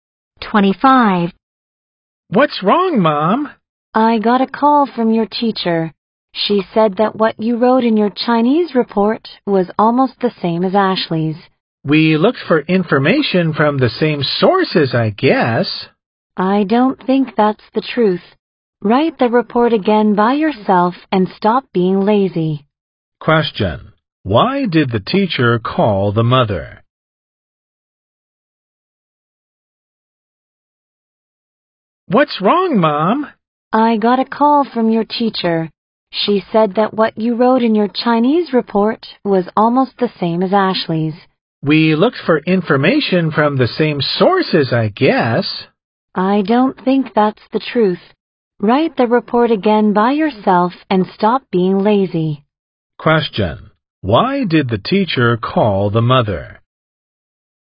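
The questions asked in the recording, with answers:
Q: Why did the teacher call the mother?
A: The child's Chinese report was almost the same as Ashley's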